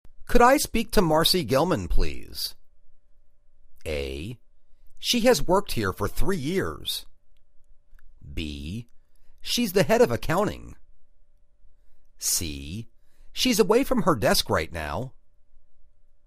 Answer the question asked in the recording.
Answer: She's away from her desk right now.